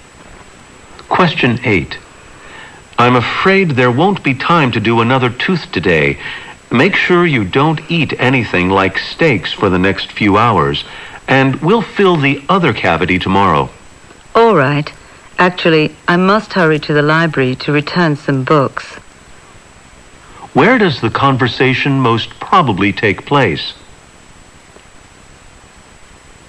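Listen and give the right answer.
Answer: At a dentist's office.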